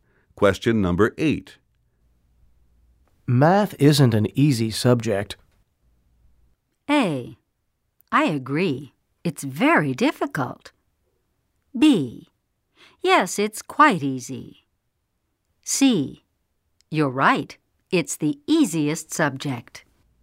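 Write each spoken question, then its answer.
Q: Math isn't an easy subject.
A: A: I agree. It's very difficult.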